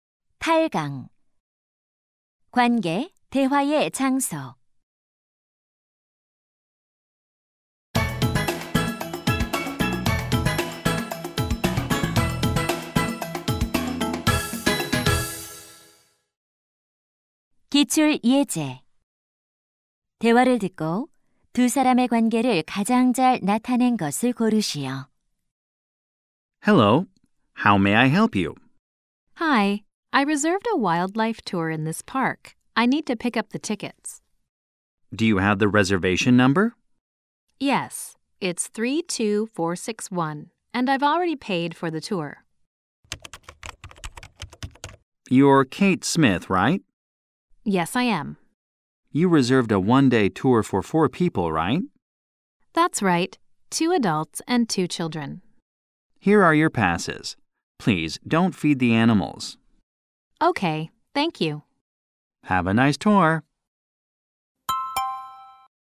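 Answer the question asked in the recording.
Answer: 공원 매표 직원 - 관광객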